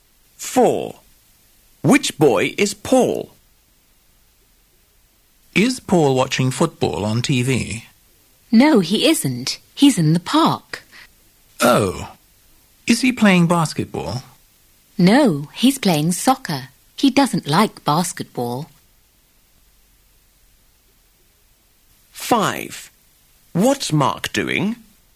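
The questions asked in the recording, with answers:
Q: Which boy is Paul?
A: The boy playing soccer in the park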